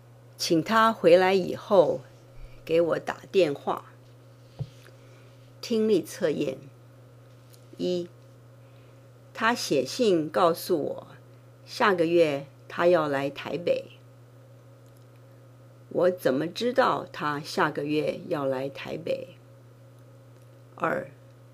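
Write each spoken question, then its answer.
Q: 我怎么知道他下个月要来台北?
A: 他写信告诉我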